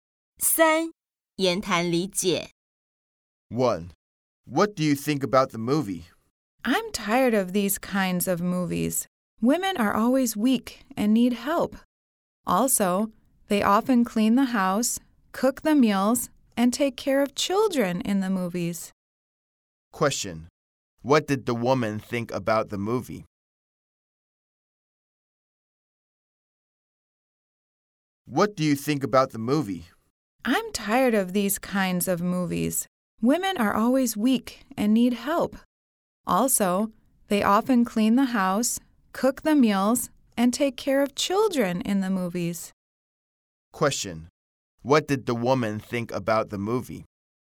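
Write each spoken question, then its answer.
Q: What did the woman think about the movie?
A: She was tired of these kinds of movies, where women are always weak and need help.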